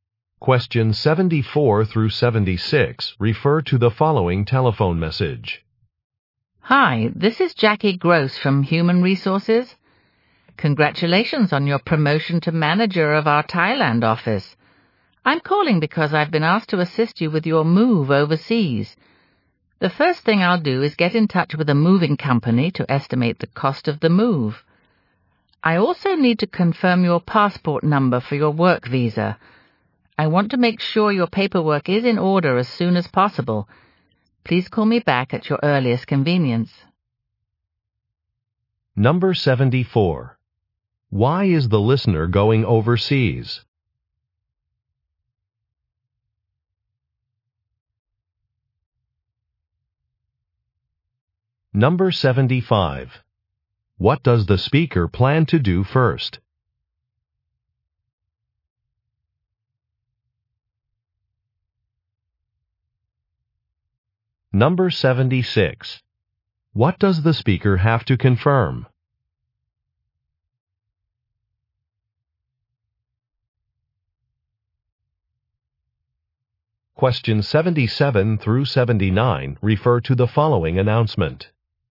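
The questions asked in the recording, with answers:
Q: Why is the listener going overseas?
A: He was promoted to manager of the Thailand office

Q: What does the speaker plan to do first?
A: Contact a moving company to estimate the cost of the move

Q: What does the speaker have to confirm?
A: The listener's passport number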